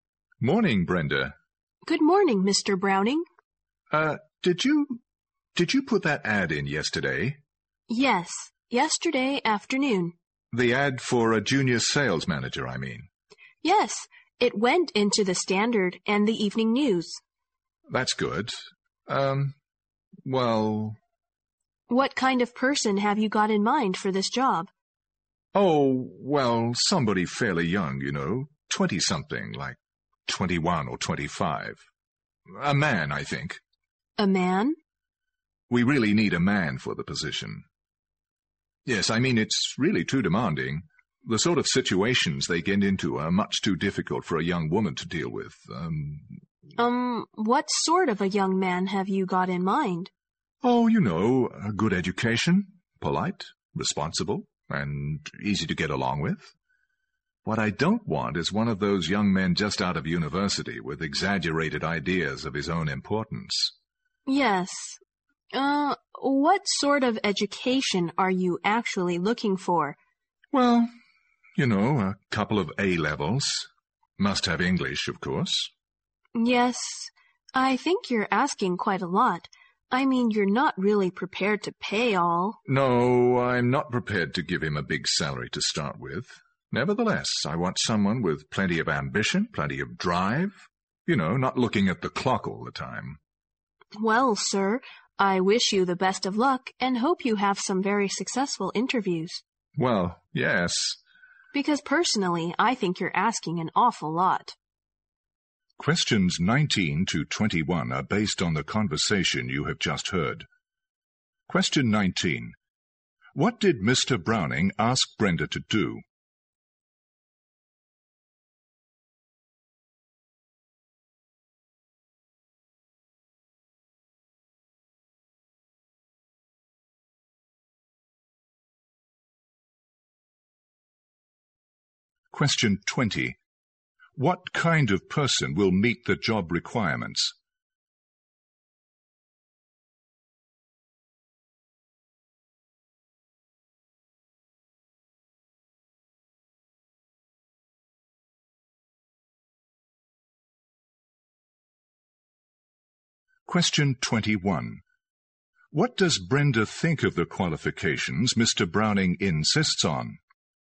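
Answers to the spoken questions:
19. Put an ad in the papers for a junior sales manager.
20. A young, well-educated, polite, responsible, ambitious man.
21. He is asking too much.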